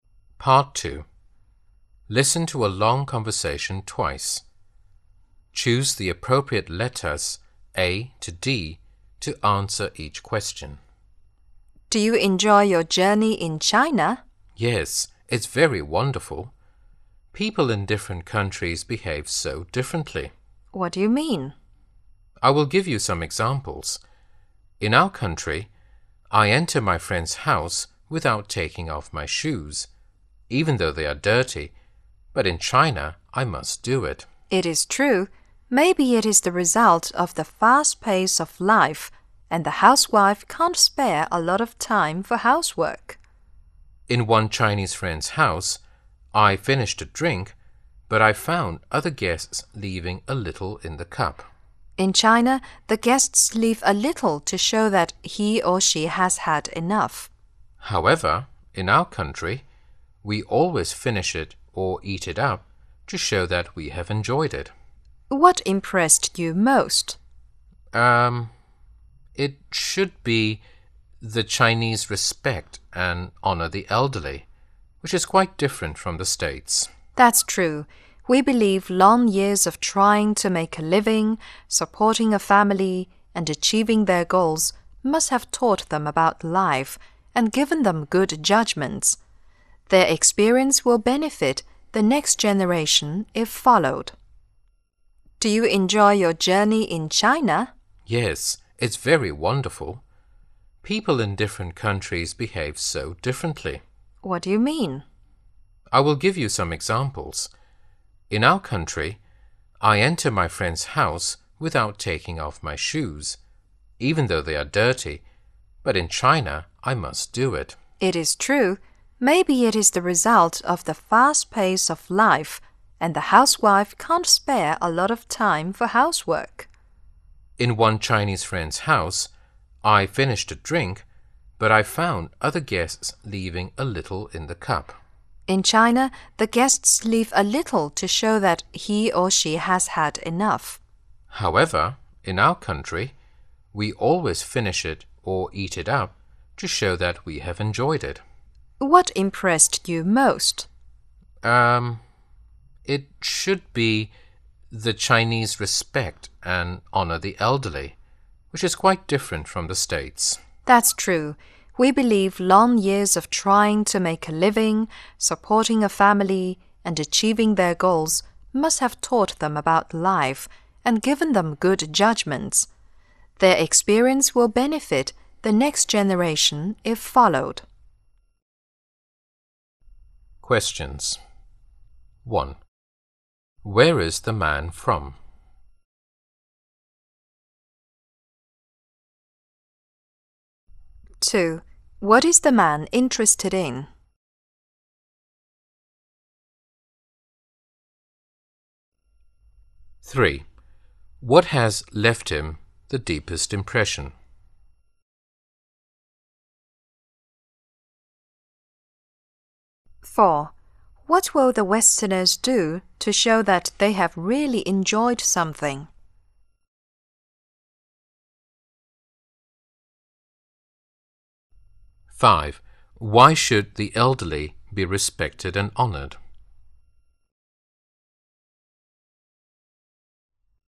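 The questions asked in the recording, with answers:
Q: Where is the man from?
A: The United States

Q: What has left him the deepest impression?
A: The Chinese respect and honor for the elderly

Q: What will the Westerners do to show that they have really enjoyed something?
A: Finish it or eat it up

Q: Why should the elderly be respected and honored?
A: Their long life experience gives them good judgment that benefits the next generation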